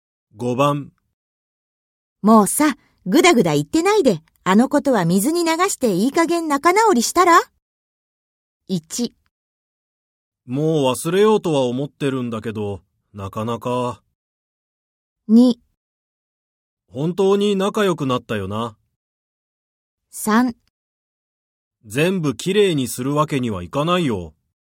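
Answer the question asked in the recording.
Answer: 1: もう忘れようとは思ってるんだけど、なかなか。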